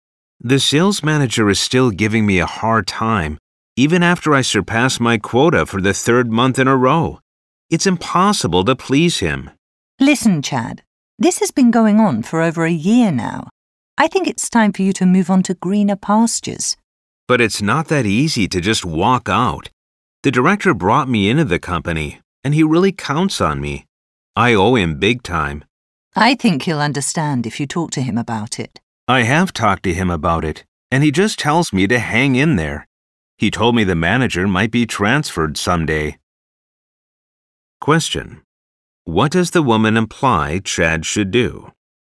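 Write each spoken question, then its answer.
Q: What does the woman imply Chad should do?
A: Leave the company and find a new job.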